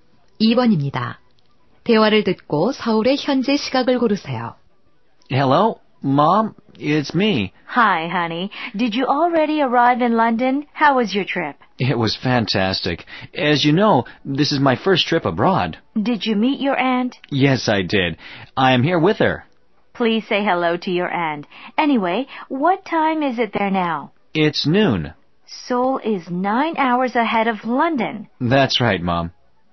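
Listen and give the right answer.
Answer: 오후 9시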